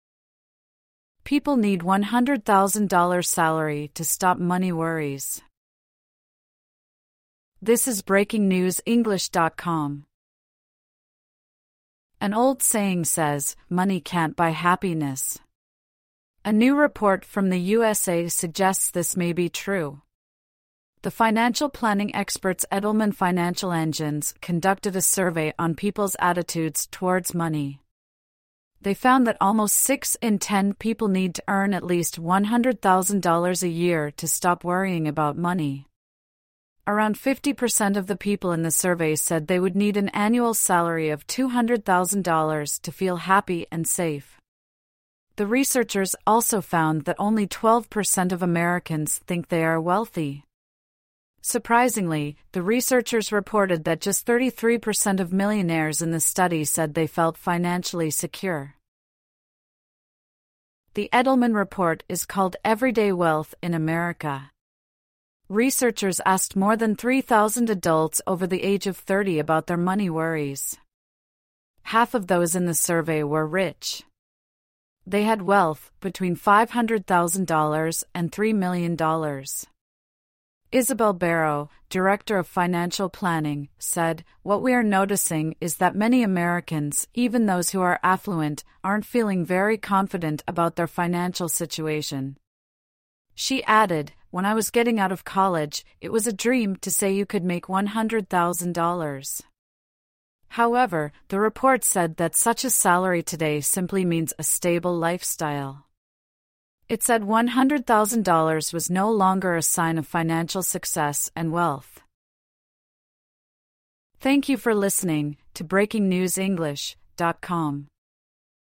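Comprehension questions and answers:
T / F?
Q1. There's an old saying that says happiness brings money.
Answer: F

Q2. Six people in the USA need $100,000 to stop worrying about money.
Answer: F

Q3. Half of the people in a survey need $200,000 a year to feel happy.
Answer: T

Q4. Just under 10 per cent of Americans think they are wealthy.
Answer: F

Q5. All of the adults in the survey were under 30 years old.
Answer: F

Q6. Many rich Americans do not feel confident about their finances.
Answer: T

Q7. The writer said people dreamed of a $100,000 salary at college.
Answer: F

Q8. The survey says a $100,000 salary is no longer a sign of wealth.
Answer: T

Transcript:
People need $100,000 salary to stop money worries
Money
An old saying goes, "Money can't buy happiness". A new report from the USA suggests this may be true. The financial planning experts Edelman Financial Engines conducted a survey on people's attitudes towards money. 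They found that nearly six in ten people needed to earn at least $100,000 a year to stop worrying about money. Around 50 per cent of the people in the survey said they would need an annual salary of $200,000 to feel happy and safe. The researchers also found that only 12 per cent of Americans think they are wealthy. Surprisingly, the researchers reported that just 33 per cent of millionaires in the study said they felt financially secure.
The Edelman report is called "Everyday Wealth in America". Researchers asked more than 3,000 adults over the age of 30 about their money worries. Half of those in the survey were "rich". They had wealth between $500,000 and $3 million. Isabel Barrow, director of financial planning, said: "What we are noticing is that many Americans, even those who are affluent, aren't feeling very confident about their financial situation." She added: "When I was getting out of college, it was a dream to say you could make $100,000". 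However, the report said that such a salary today simply means a stable lifestyle. It said $100,000 was no longer a sign of financial success and wealth.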